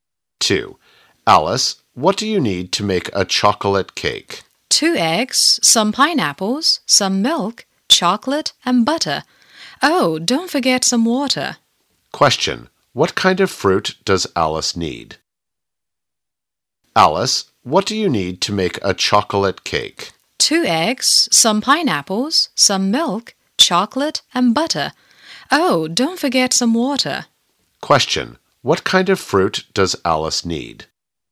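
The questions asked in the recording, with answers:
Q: What kind of fruit does Alice need?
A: Pineapples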